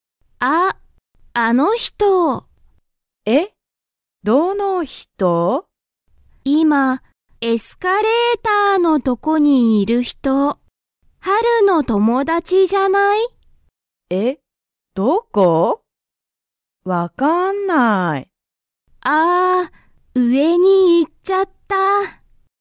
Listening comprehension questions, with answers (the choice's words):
「あの人」(ひと)」は____のとこにいた。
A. 学校(がっこう)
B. 店(みせ)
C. レストラン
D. エスカレーター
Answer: エスカレーター

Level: Level 1